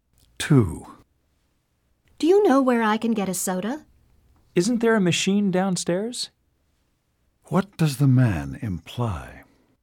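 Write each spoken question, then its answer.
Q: What does the man imply?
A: There is a soda machine downstairs.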